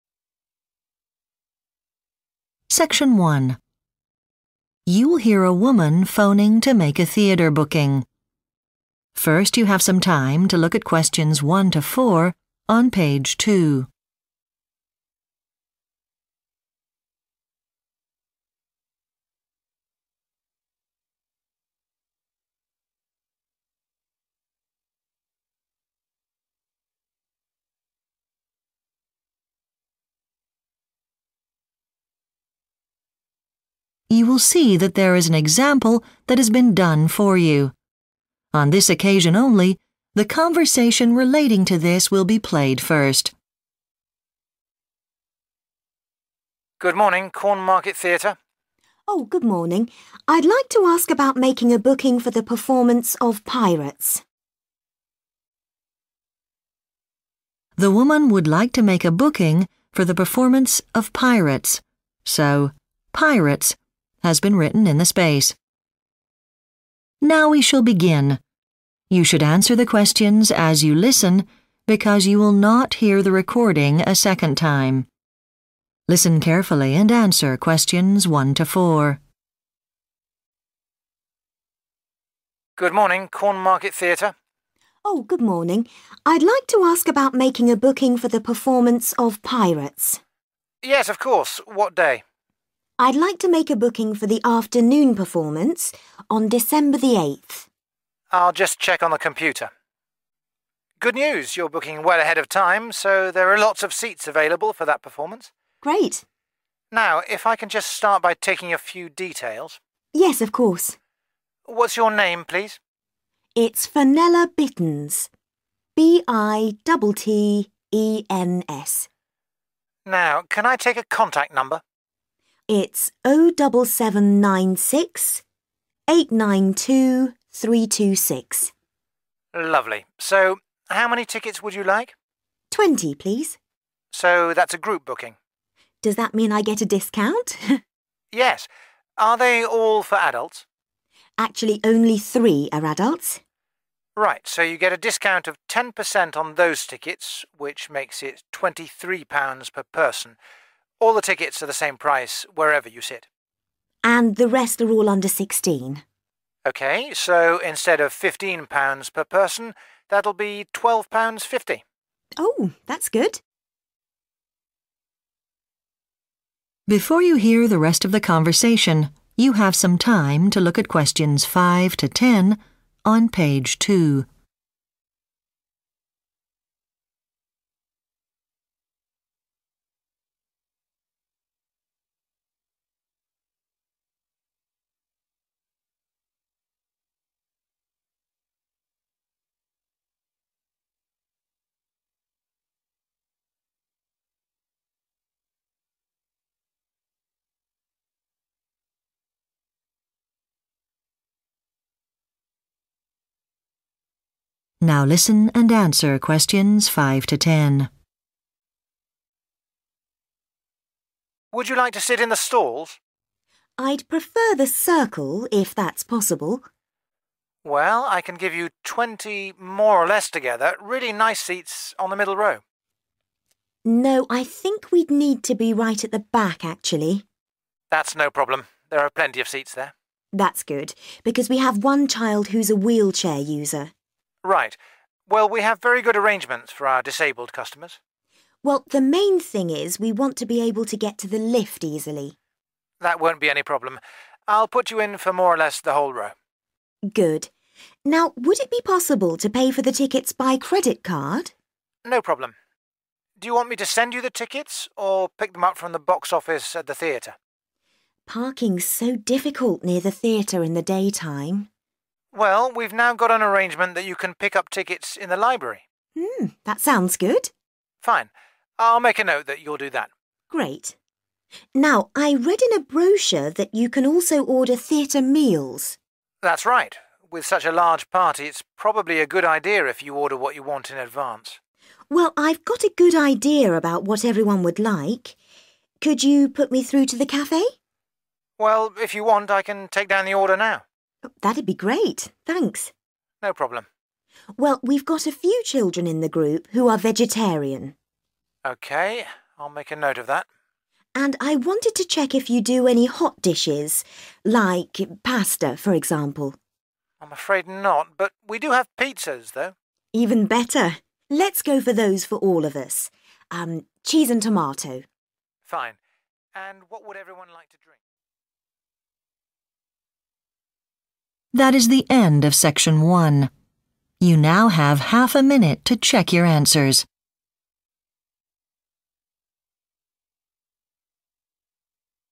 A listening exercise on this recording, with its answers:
Complete the notes below. Write ONE WORD AND/OR A NUMBER for each answer.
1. Name: Fenella 1 .......................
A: Bittens

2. Type of booking: 2 ....................... with discount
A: group

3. 3 adults at 3 ....................... pounds each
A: 23

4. Children under 16 at 4 ....................... pounds each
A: 12.50

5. Requires seats on the 5 ....................... row of the circle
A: back

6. One person uses a 6 .......................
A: wheelchair

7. Need to have good access to the 7 .......................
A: lift

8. Will collect the tickets from the 8 .......................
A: library

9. Several people are 9 .......................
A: vegetarian

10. Food: 10 ....................... (cheese and tomato)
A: pizza